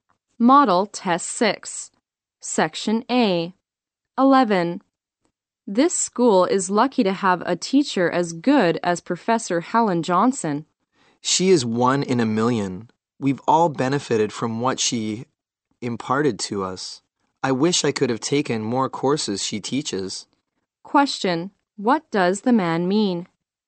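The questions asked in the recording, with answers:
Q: Question, what does the man mean?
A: Professor Helen Johnson is an excellent teacher he wishes he had more courses with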